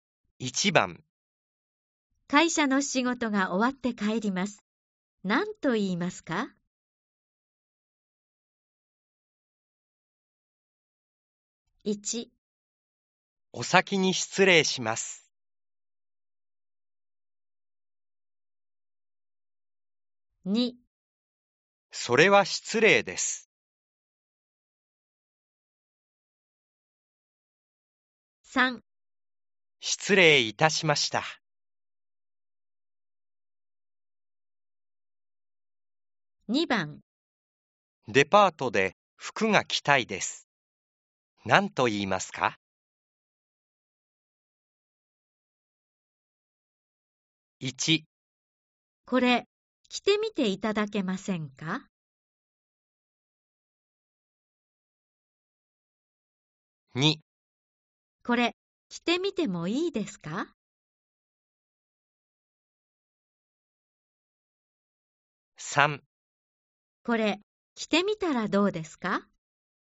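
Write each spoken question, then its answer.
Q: 会社の仕事が終わって帰ります。何と言いますか?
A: 1: お先に失礼します。

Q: デパートで服が着たいです。何と言いますか?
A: 2: これ、着てみてもいいですか?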